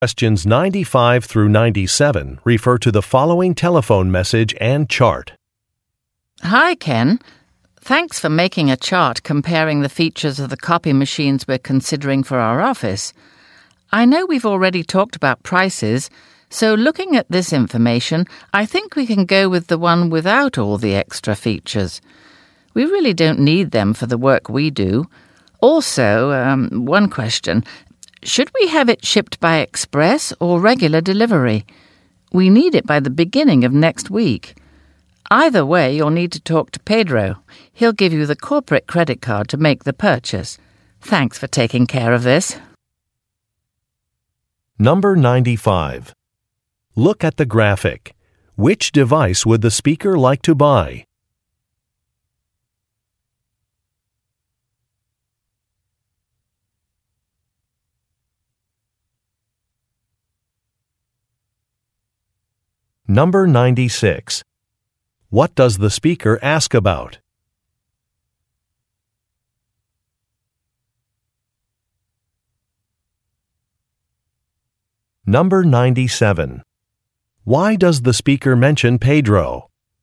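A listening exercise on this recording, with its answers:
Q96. What does the speaker ask about?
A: The best shipping method

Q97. Why does the speaker mention Pedro?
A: He has a credit card.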